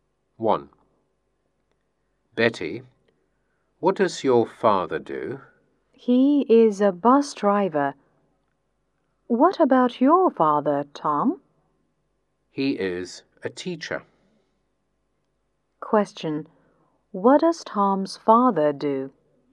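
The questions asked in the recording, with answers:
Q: What does Tom's father do?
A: He is a teacher.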